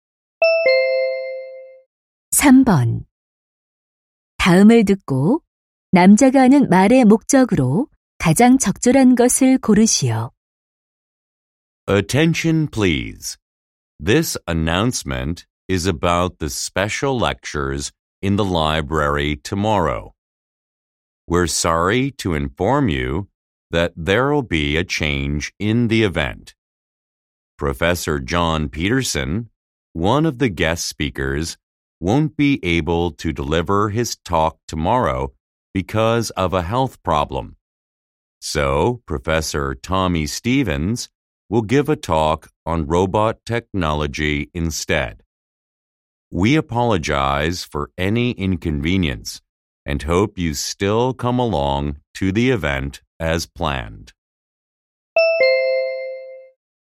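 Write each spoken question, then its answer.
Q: 다음을 듣고 남자가 하는 말의 목적으로 가장 적절한 것을 고르시오.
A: 특강 연사 변경을 알리려고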